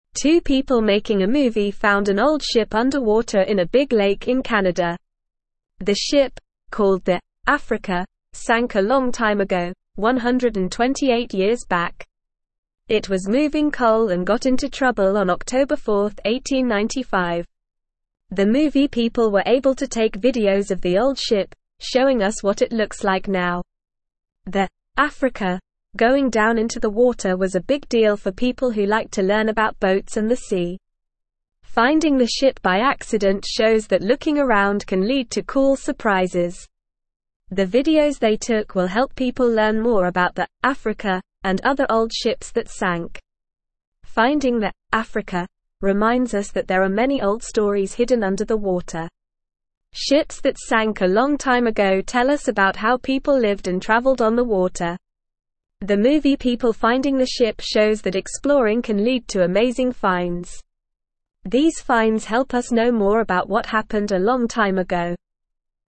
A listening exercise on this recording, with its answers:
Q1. Two people making a (1)______ found an old (2)______ underwater in a big lake in Canada.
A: movie

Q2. Two people making a (1)______ found an old (2)______ underwater in a big lake in Canada.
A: ship

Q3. It was (3)______ coal and got into trouble on October 4, 1895.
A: moving

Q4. The movie people were able to take (4)______ of the old ship, (5)______ us what it looks like now.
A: videos

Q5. The movie people were able to take (4)______ of the old ship, (5)______ us what it looks like now.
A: showing

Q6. (6)______ the ship by accident shows that looking around can lead to cool surprises.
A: Finding

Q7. The videos they took will help people learn more about the 'Africa' and other old (7)______ that (8)______.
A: ships

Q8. The videos they took will help people learn more about the 'Africa' and other old (7)______ that (8)______.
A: sank

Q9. Finding the 'Africa' reminds us that there are many old stories (9)______ under the water.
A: hidden

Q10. Ships that sank a long time ago (10)______ us about how people lived and traveled on the water.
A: tell

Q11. The movie people finding the ship shows that exploring can lead to amazing (11)______.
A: finds

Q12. These finds help us know (12)______ about what happened a long time ago.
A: more

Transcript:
Two people making a movie found an old ship underwater in a big lake in Canada. The ship, called the 'Africa,' sank a long time ago, 128 years back. It was moving coal and got into trouble on October 4, 1895. The movie people were able to take videos of the old ship, showing us what it looks like now.
The 'Africa' going down into the water was a big deal for people who like to learn about boats and the sea. Finding the ship by accident shows that looking around can lead to cool surprises. The videos they took will help people learn more about the 'Africa' and other old ships that sank.
Finding the 'Africa' reminds us that there are many old stories hidden under the water. Ships that sank a long time ago tell us about how people lived and traveled on the water. The movie people finding the ship shows that exploring can lead to amazing finds. These finds help us know more about what happened a long time ago.

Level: Level 2